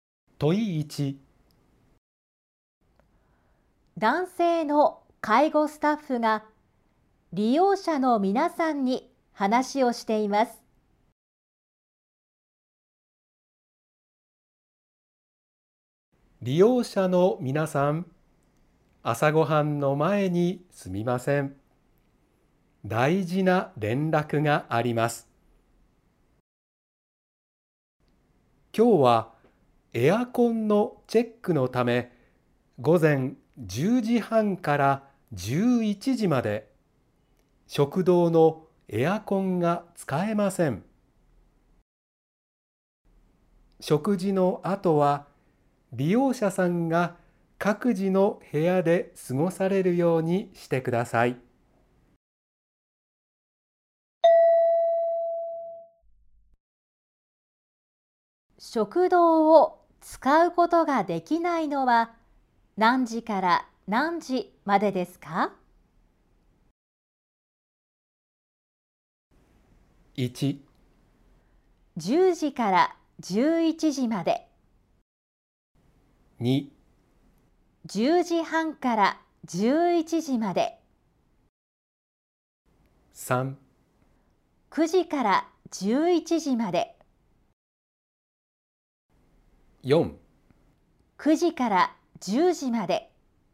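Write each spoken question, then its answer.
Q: 食堂を使うことができないのは何時から何時までですか?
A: 2: 10時半から11時まで。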